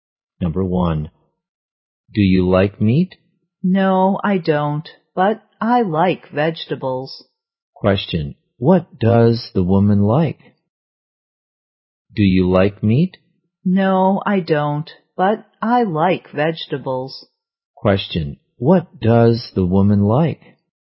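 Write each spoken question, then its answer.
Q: what does the woman like?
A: Vegetables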